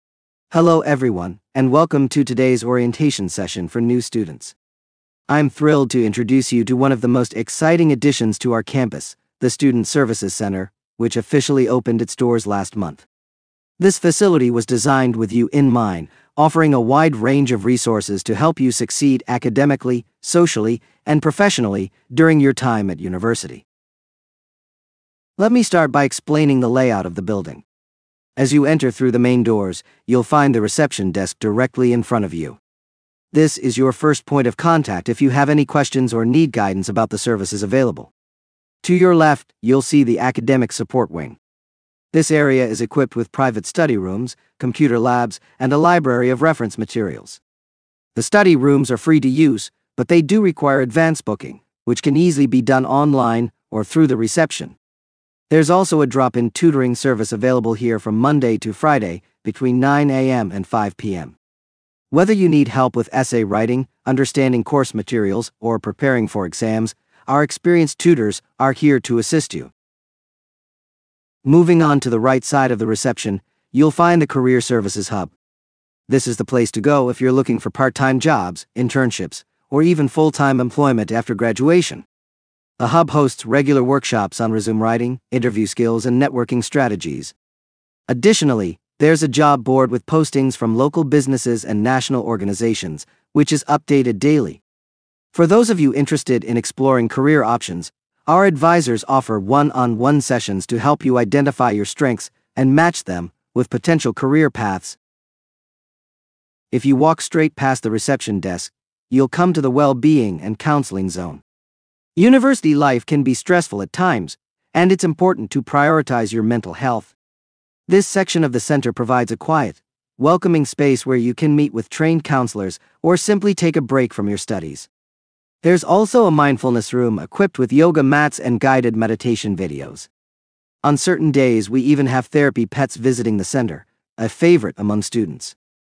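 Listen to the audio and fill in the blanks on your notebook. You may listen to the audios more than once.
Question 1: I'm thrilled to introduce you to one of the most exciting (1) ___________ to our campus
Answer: additions

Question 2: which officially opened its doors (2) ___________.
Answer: last month

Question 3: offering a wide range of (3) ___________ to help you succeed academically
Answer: resources

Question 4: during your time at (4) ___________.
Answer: university

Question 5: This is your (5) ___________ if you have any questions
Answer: first point of contact

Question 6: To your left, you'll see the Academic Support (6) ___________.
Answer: Wing

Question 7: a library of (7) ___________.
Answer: reference materials

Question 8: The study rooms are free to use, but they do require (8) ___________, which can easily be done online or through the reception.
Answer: advance booking

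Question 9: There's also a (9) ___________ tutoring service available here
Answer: drop-in

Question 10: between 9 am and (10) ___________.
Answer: 5 pm

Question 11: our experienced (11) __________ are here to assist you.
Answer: tutors

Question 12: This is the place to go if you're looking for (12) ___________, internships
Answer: part-time jobs

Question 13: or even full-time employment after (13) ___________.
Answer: graduation

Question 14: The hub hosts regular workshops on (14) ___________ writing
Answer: resume

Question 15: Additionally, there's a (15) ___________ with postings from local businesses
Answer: job board

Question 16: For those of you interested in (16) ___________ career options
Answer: exploring

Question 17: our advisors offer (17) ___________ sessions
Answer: one-on-one

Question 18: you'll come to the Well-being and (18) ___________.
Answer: Counseling Zone

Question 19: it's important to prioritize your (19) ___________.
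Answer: mental health

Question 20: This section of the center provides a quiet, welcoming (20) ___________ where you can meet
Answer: space

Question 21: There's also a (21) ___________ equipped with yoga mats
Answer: mindfulness room

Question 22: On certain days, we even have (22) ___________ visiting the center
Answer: therapy pets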